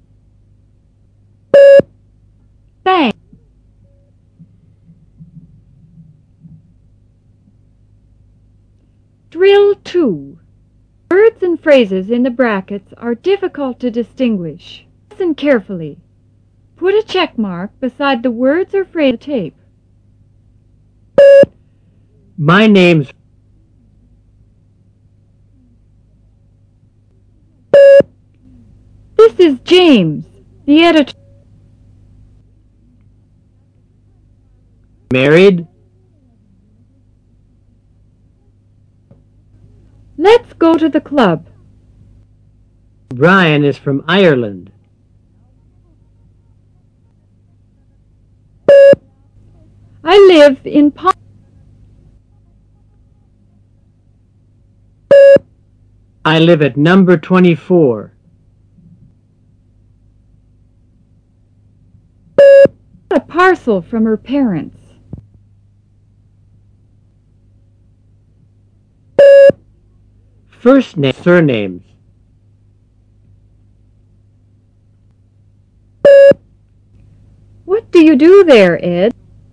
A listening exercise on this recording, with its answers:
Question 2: This is (Jane----James),the editor.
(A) Jane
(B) James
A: (B) James

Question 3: Are you (married----Mary)?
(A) married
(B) Mary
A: (A) married

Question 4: Let's go to the (club----pub)..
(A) club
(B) pub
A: (A) club

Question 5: Mr. O' Brien is from (an island ----Ireland).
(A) an island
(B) Ireland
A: (B) Ireland

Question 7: I live at (No. 24----924).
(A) No. 24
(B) 924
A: (A) No. 24

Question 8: I've brought a (parcel----pencil) from her parents.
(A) parcel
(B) pencil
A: (A) parcel

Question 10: What do you do there. (Ed----Ted)?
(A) Ed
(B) Ted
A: (A) Ed

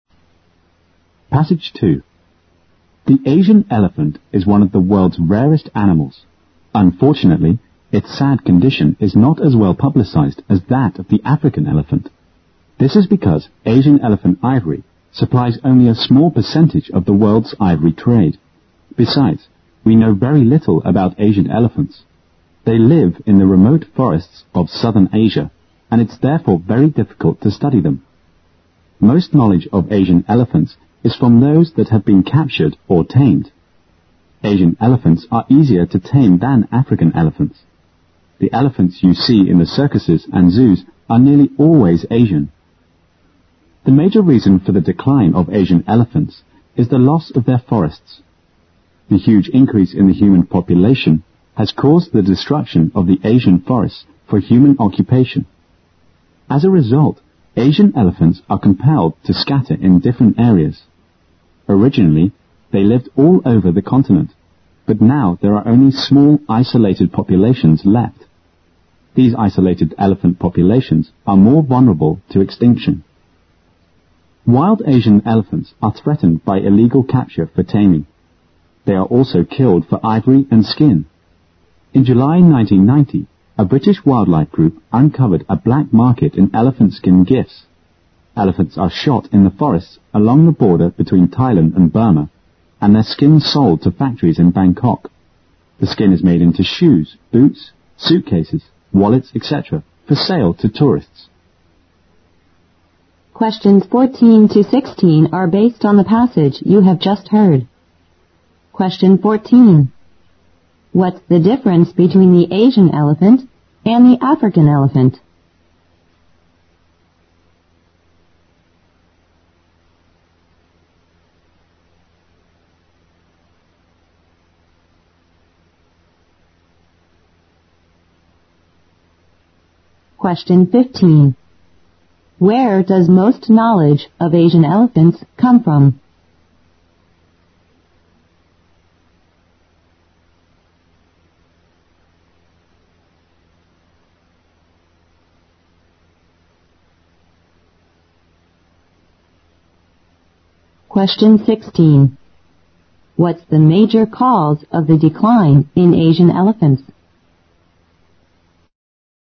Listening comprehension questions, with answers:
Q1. What's the difference between the Asian elephant and the African elephant?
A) The Asian elephant is easier to tame.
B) The Asian elephant's skin is more valuable.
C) The Asian elephant is less popular with tourists.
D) The Asian elephant produces ivory of a better quality.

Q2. Where does most knowledge of Asian elephants come from?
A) From the captured or tamed elephants.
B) From the British wildlife protection group.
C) From elephant hunters in Thailand and Burma.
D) From tourists visiting the Thai-Burmese border.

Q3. What the major cause of the decline in Asian elephants?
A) Their taming for circuses and zoos.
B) The destruction of their natural homes.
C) Man's lack of knowledge about their behavior.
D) The greater vulnerability to extinction than other species.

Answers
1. A) The Asian elephant is easier to tame.
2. A) From the captured or tamed elephants.
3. B) The destruction of their natural homes.

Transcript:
The Asian elephant is one of the world's rarest animals. Unfortunately, its sad condition is not as well popularized as that of the African elephant. This is because Asian elephant's ivory supplies only a small percentage of the world's ivory trade, besides we know very little about Asian elephants. They live in the remote forests of southern Asian. And it's therefore very difficult to study them. Most knowledge of Asian elephants is from those that have been captured or tamed(15). Asian elephants are easier to tame than African elephants(14). The elephants you see in the circuses and zoos are nearly always Asian. The major reason for the decline of Asian elephants is the loss of their forests. The huge increase in human population has caused the destruction of Asian forests(16) for human occupation. As a result, Asian elephants are compelled to scatter in different areas. Originally, they lived all over the continent. But now there are only small isolated populations left. These isolated elephant populations are more vulnerable to extinction. Wild Asian elephants are threatened by illegal capture for taming. They are also killed for ivory and skin. In July, 1990, a British wildlife group uncovered a black market in elephant's skin gifts. Elephants are shot in the forests along the border between Thailand and Burma. And their skins are sold to factories and Bangkok. The skin is made into shoes, boots, suitcases, wallet, etc. for sale to tourists.

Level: 六级

